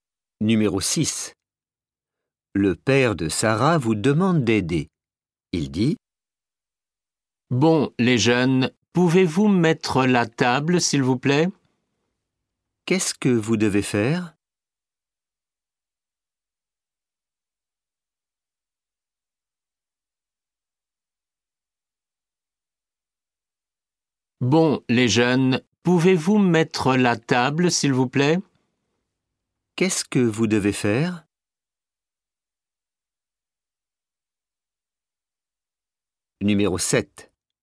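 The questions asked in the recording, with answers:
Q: Qu'est-ce que vous devez faire?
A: Mettre la table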